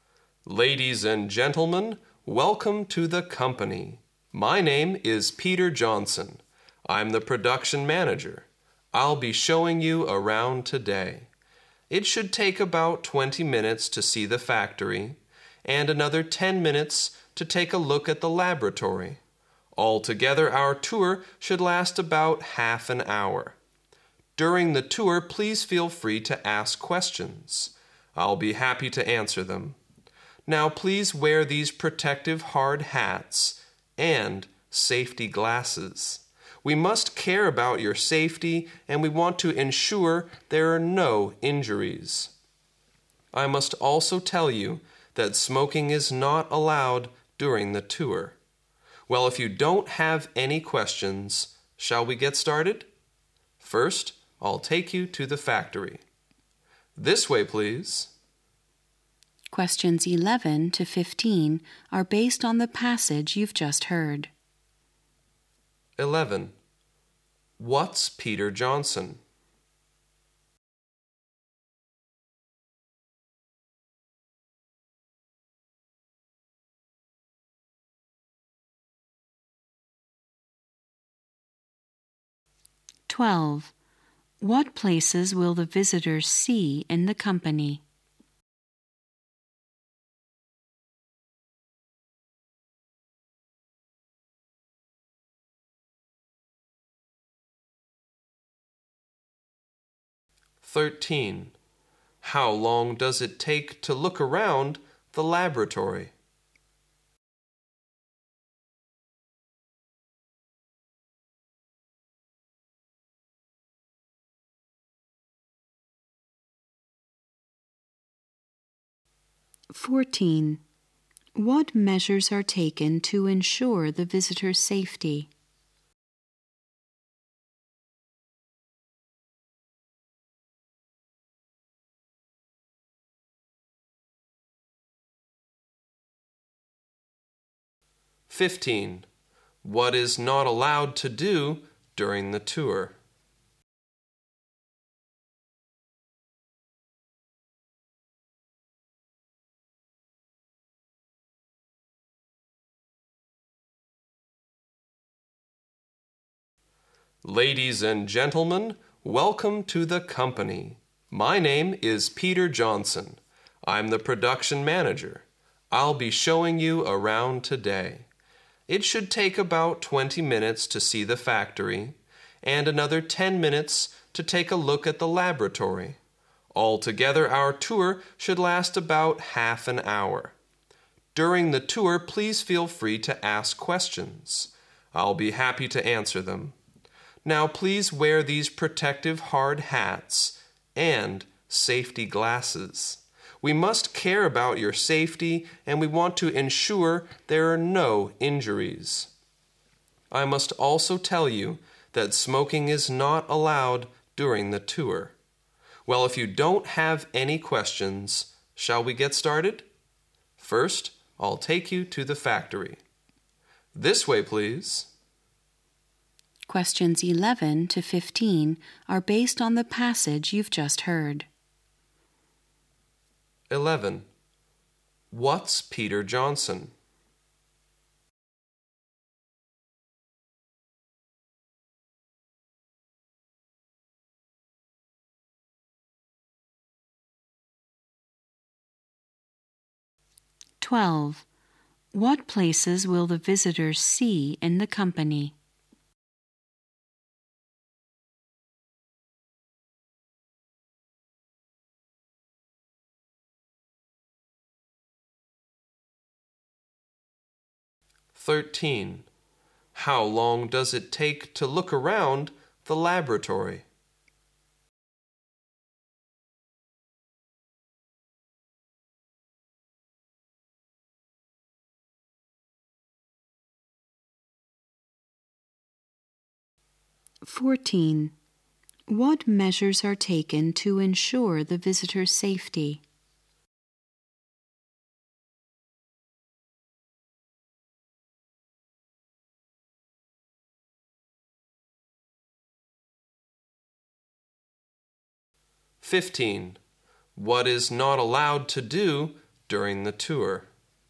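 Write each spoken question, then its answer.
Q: What's Peter Johnson?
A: The production manager

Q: What places will the visitors see in the company?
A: The factory and the laboratory

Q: How long does it take to look around the laboratory?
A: About 10 minutes

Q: What measures are taken to ensure the visitor's safety?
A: Wearing hard hats and safety glasses

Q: What is not allowed to do during the tour?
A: Smoking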